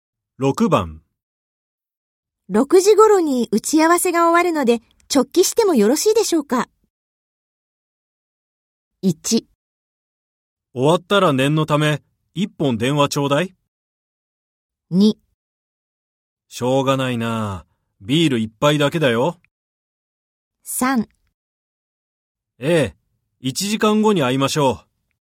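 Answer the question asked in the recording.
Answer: 1: 終わったら念のため、一本電話ちょうだい。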